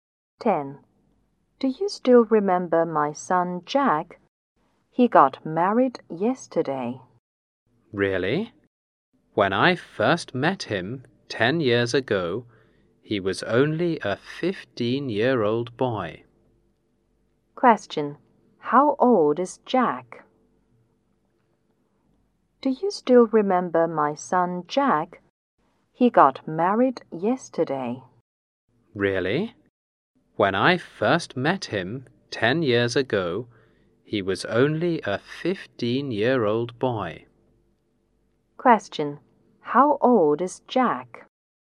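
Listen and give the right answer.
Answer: 25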